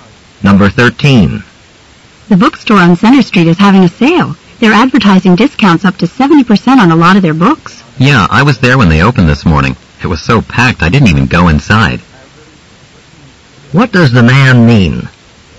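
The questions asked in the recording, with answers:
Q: What does the man mean?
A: The store was too crowded, so he didn't go in.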